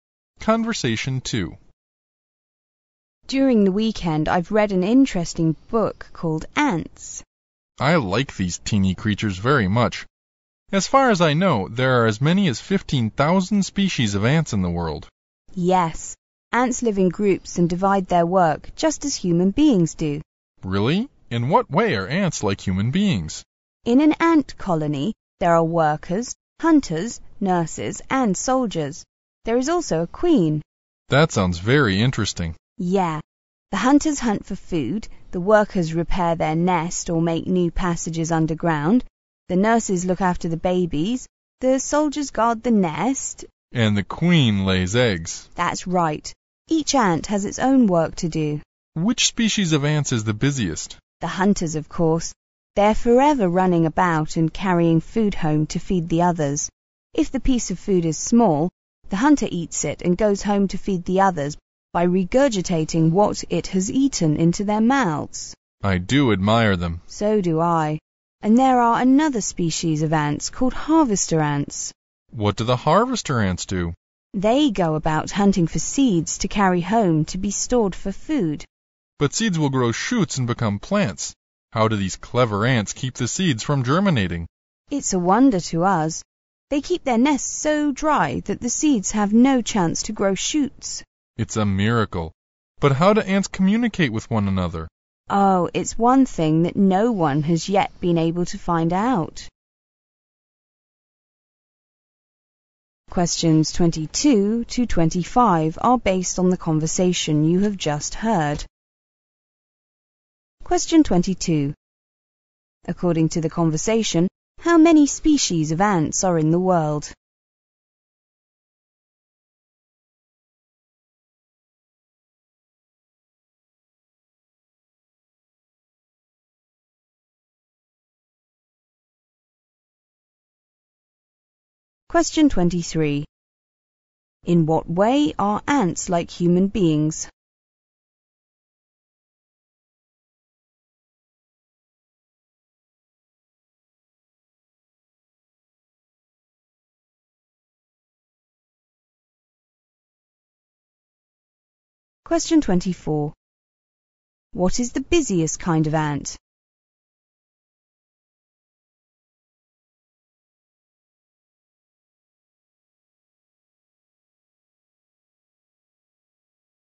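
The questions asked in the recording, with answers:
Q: According to the conversation, how many species of ants are in the world?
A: About 15,000

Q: In what way are ants like human beings?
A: They live in groups and divide their work

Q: What is the busiest kind of ant?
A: The hunters

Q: What do the harvester ants do?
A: They hunt for seeds to carry home and store for food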